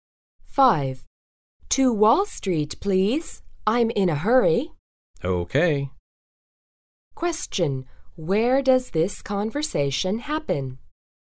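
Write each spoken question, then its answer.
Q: Where does this conversation happen?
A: In a taxi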